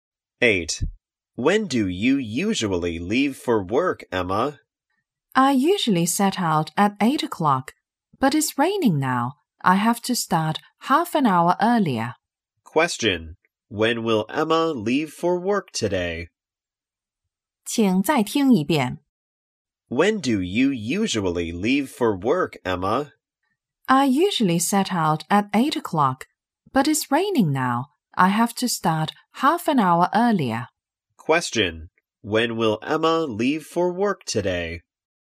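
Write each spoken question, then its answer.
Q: Question. When will Emma leave for work today?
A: At 7:30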